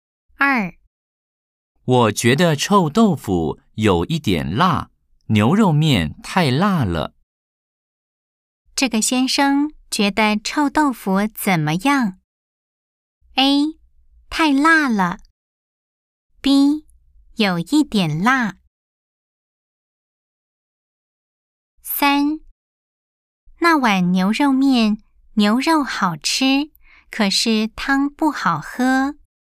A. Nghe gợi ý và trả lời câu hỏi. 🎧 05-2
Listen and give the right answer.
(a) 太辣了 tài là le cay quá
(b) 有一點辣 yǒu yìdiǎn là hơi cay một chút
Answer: (b) 有一點辣 yǒu yìdiǎn là hơi cay một chút